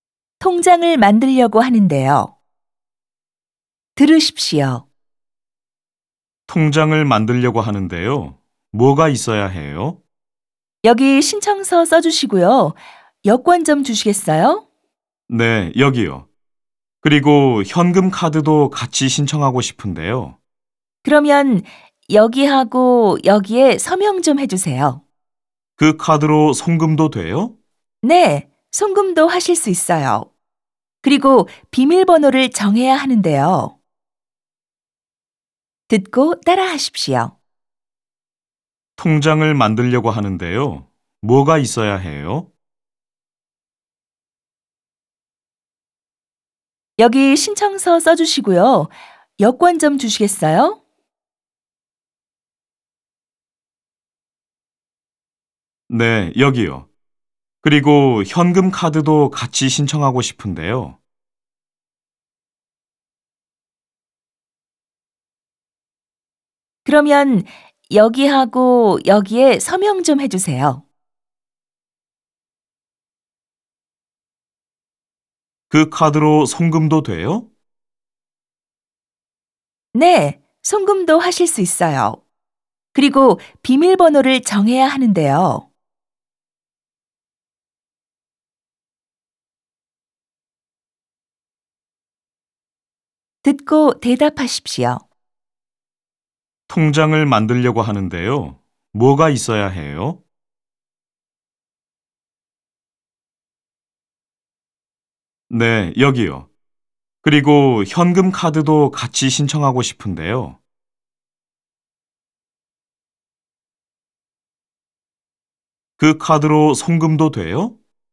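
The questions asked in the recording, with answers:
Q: 통장을 만들려고 하는데요. 뭐가 있어야 해요?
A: 신청서와 여권이 있어야 해요.

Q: 그 카드로 송금도 돼요?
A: 네, 송금도 하실 수 있어요.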